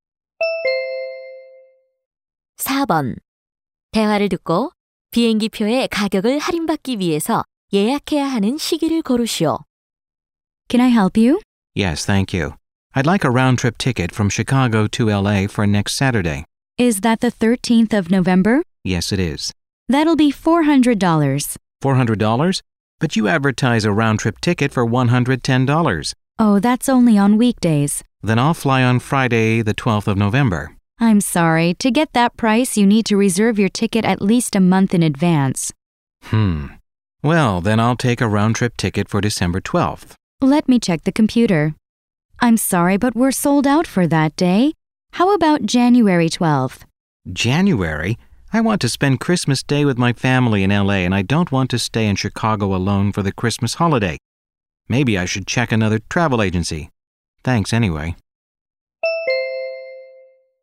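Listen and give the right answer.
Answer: 최소 한 달 전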